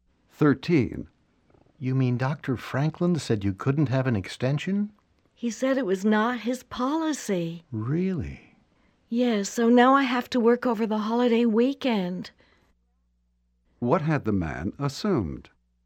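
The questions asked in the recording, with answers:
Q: What had the man assumed?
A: That Dr. Franklin would give the woman an extension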